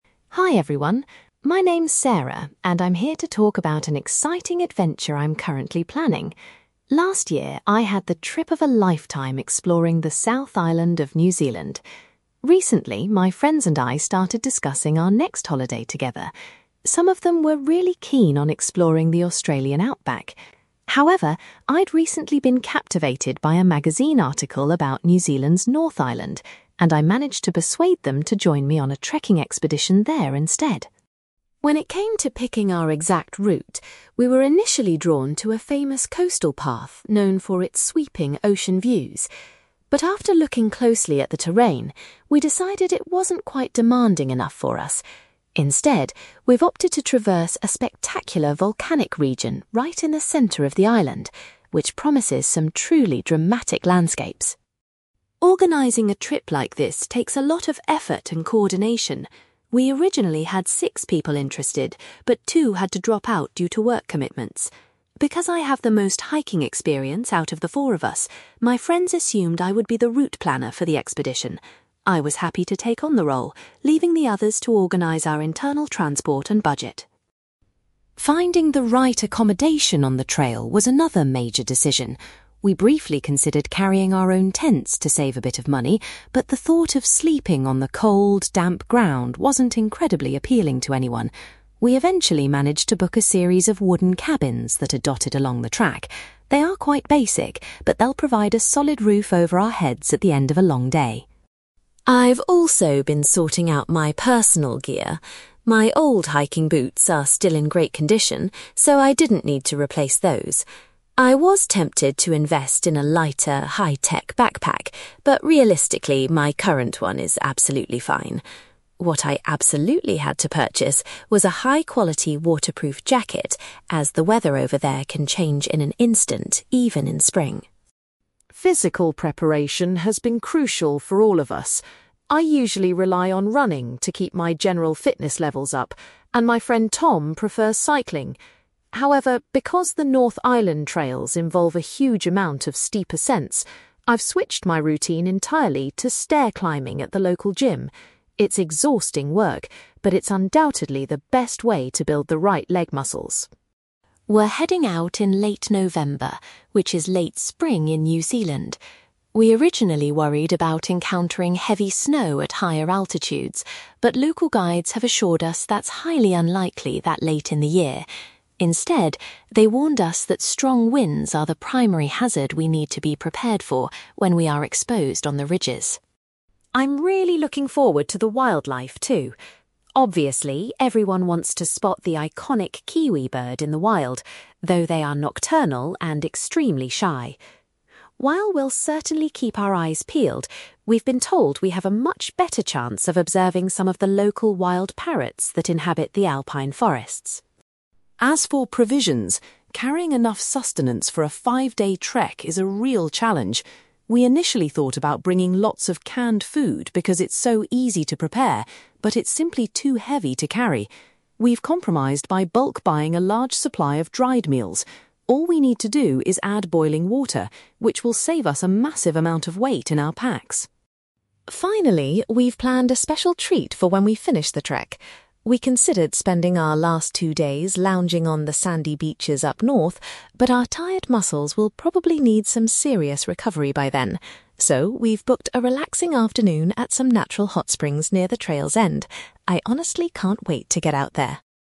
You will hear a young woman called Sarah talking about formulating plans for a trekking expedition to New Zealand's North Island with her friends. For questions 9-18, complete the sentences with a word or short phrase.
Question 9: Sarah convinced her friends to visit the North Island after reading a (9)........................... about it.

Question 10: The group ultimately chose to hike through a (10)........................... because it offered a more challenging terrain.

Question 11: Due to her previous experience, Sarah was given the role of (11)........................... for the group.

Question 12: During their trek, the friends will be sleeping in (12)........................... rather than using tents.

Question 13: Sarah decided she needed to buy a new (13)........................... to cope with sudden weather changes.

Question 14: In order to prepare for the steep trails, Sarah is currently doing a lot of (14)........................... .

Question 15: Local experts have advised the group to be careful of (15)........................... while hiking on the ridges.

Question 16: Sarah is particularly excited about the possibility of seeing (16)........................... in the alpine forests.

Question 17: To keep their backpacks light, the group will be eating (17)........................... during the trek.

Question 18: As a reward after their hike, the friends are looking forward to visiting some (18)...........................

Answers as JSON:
{"9": "magazine article", "10": "volcanic region", "11": "route planner", "12": "wooden cabins", "13": "waterproof jacket", "14": "stair climbing", "15": "strong winds", "16": "wild parrots", "17": "dried meals", "18": "hot springs"}

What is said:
Sarah: Hi everyone. My name is Sarah, and I'm here to talk about an exciting adventure I'm currently planning. Last year, I had the trip of a lifetime exploring the South Island of New Zealand. Recently, my friends and I started discussing our next holiday together. Some of them were really keen on exploring the Australian outback. However, I'd recently been captivated by a magazine article about New Zealand's North Island, and I managed to persuade them to join me on a trekking expedition there instead.
When it came to picking our exact route, we were initially drawn to a famous coastal path known for its sweeping ocean views. But after looking closely at the terrain, we decided it wasn't quite demanding enough for us. Instead, we've opted to traverse a spectacular volcanic region right in the centre of the island, which promises some truly dramatic landscapes.
Organising a trip like this takes a lot of effort and coordination. We originally had six people interested, but two had to drop out due to work commitments. Because I have the most hiking experience out of the four of us, my friends assumed I would be the route planner for the expedition. I was happy to take on the role, leaving the others to organise our internal transport and budget.
Finding the right accommodation on the trail was another major decision. We briefly considered carrying our own tents to save a bit of money, but the thought of sleeping on the cold, damp ground wasn't incredibly appealing to anyone. We eventually managed to book a series of wooden cabins that are dotted along the track. They are quite basic, but they'll provide a solid roof over our heads at the end of a long day.
I've also been sorting out my personal gear. My old hiking boots are still in great condition, so I didn't need to replace those. I was tempted to invest in a lighter, high-tech backpack, but realistically, my current one is absolutely fine. What I absolutely had to purchase was a high-quality waterproof jacket, as the weather over there can change in an instant, even in spring.
Physical preparation has been crucial for all of us. I usually rely on running to keep my general fitness levels up, and my friend Tom prefers cycling. However, because the North Island trails involve a huge amount of steep ascents, I've switched my routine entirely to stair climbing at the local gym. It's exhausting work, but it's undoubtedly the best way to build the right leg muscles.
We're heading out in late November, which is late spring in New Zealand. We originally worried about encountering heavy snow at higher altitudes, but local guides have assured us that's highly unlikely that late in the year. Instead, they warned us that strong winds are the primary hazard we need to be prepared for when we are exposed on the ridges.
I'm really looking forward to the wildlife, too. Obviously, everyone wants to spot the iconic kiwi bird in the wild, though they are nocturnal and extremely shy. While we'll certainly keep our eyes peeled, we've been told we have a much better chance of observing some of the local wild parrots that inhabit the alpine forests.
As for provisions, carrying enough sustenance for a five-day trek is a real challenge. We initially thought about bringing lots of canned food because it's so easy to prepare, but it's simply too heavy to carry. We've compromised by bulk-buying a large supply of dried meals. All we need to do is add boiling water, which will save us a massive amount of weight in our packs.
Finally, we've planned a special treat for when we finish the trek. We considered spending our last two days lounging on the sandy beaches up north, but our tired muscles will probably need some serious recovery by then. So, we've booked a relaxing afternoon at some natural hot springs near the trail's end. I honestly can't wait to get out there!

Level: B2